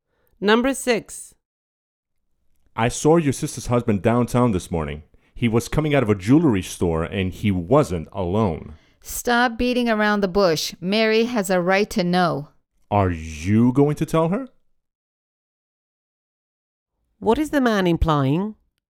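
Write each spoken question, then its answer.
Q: What is the man implying?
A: Mary's husband may be cheating on her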